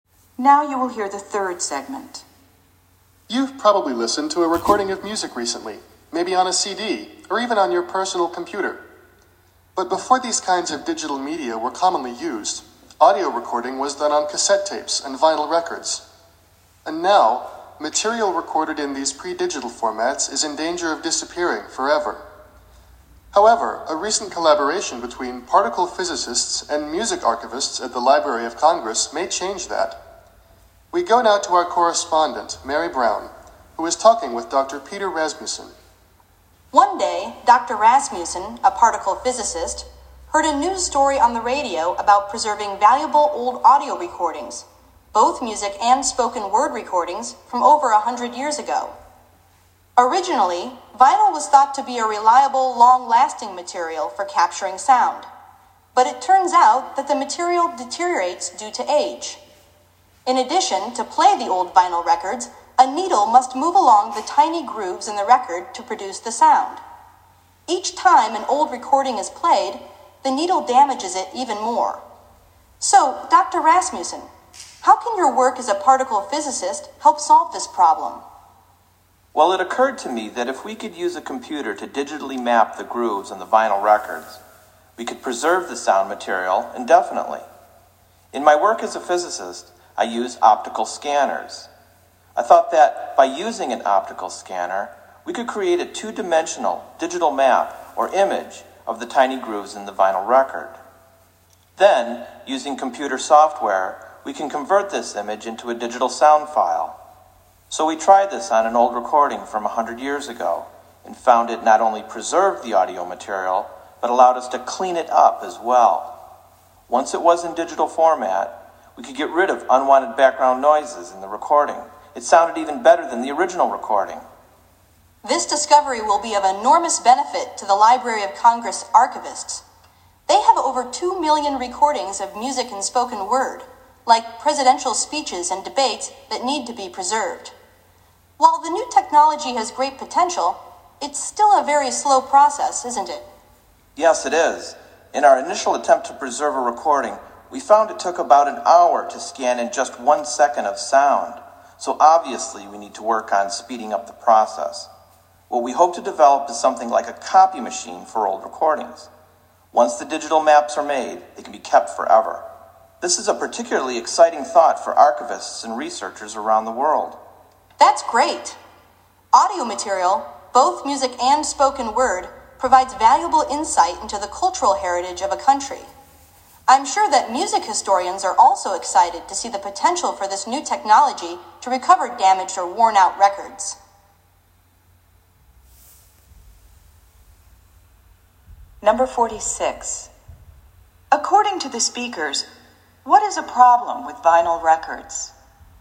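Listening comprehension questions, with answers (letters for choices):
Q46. According to the speakers, what is a problem with vinyl records?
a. They are difficult to duplicate.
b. They deteriorate over time.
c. They break easily.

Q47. What is the main advantage of Dr. Rasmussen's process?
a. Sound files can be digitally mapped.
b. Audio material can be preserved indefinitely.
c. Background noises can be eliminated.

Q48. What is meant by the phrase clean it up?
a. delete unwanted sound files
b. remove dust and dirt from the grooves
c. remove unwanted background noise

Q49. According to Dr. Rasmussen, what is a problem with the new technology?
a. the price of the equipment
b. the rate of processing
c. the unreliable technology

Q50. Why is the Library of Congress interested in audio archiving?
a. It helps to preserve a cultural heritage.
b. It leads to new technology.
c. It is faster than old recording methods.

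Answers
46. b
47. b
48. c
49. b
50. a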